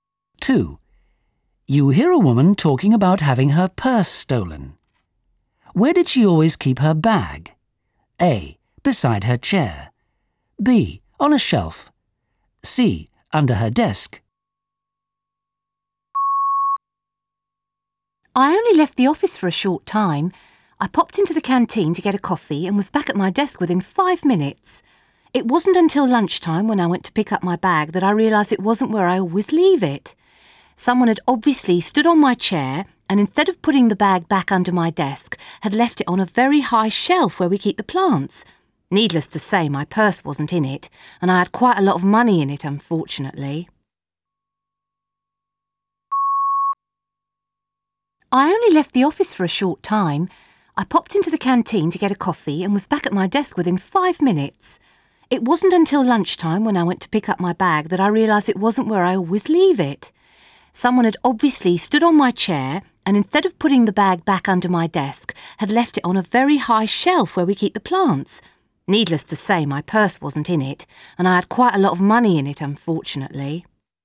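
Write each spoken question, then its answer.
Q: Where did she always keep her bag? A. Beside her chair. B. On a shelf. C. Under her desk.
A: C: Under her desk.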